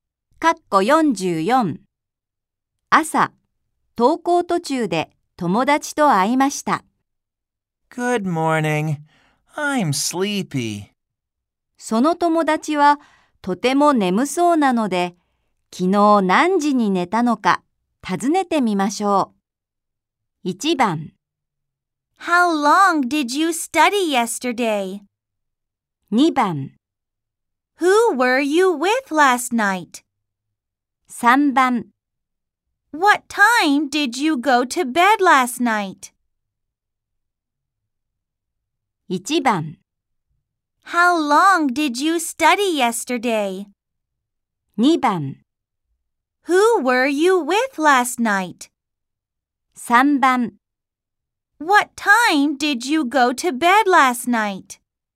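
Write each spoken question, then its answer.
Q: その友達はとても眠そうなので、昨日何時に寝たのか尋ねてみましょう。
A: 3: What time did you go to bed last night?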